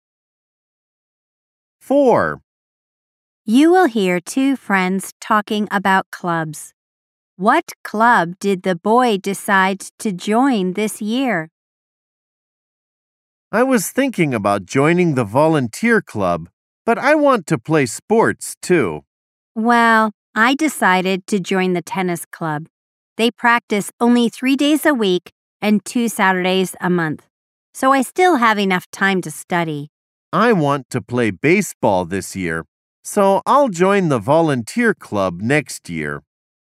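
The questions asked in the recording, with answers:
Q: What club did the boy decide to join this year?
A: The baseball club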